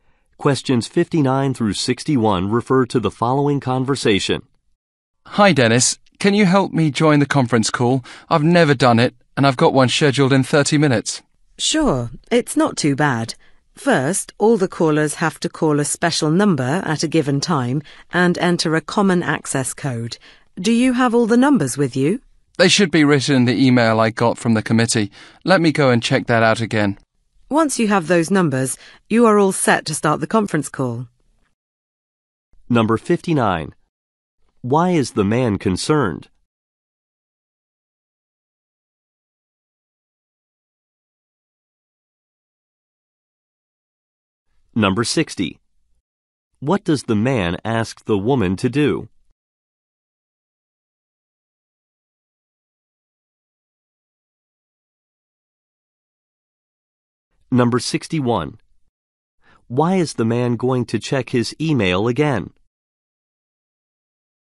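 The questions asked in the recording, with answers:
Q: Why is the man concerned?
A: He has never joined a conference call

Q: Why is the man going to check his email again?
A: To find the call number and access code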